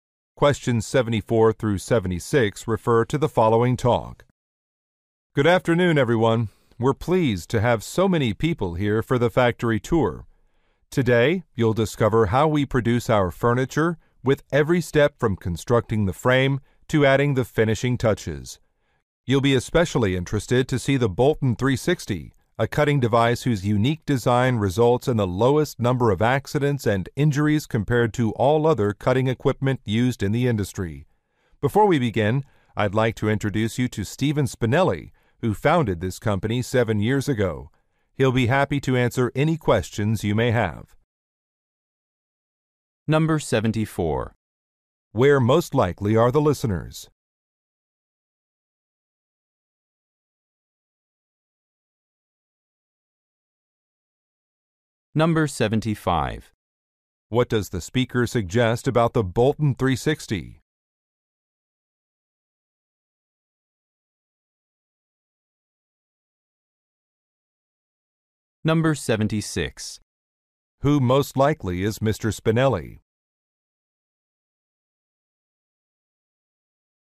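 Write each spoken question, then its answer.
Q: Where most likely are the listeners?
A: At a furniture factory

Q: What does the speaker suggest about the Bolton 360?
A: It is the safest cutting device

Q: Who most likely is Mr. Spinelli?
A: The company founder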